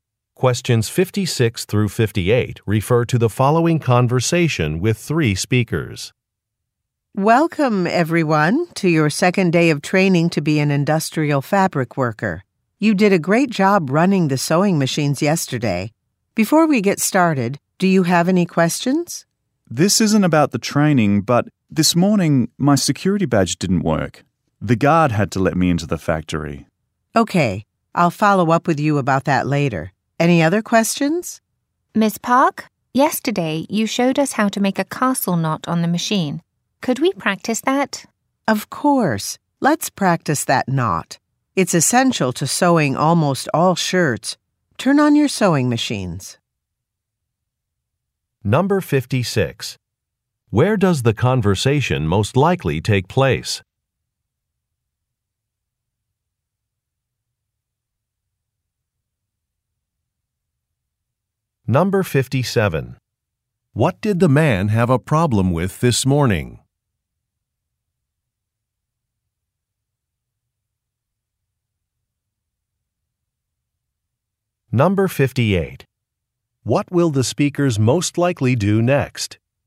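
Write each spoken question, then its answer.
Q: Where does the conversation most likely take place?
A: At a factory

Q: What did the man have a problem with this morning?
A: His security badge

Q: What will the speakers most likely do next?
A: Practice making a knot on sewing machines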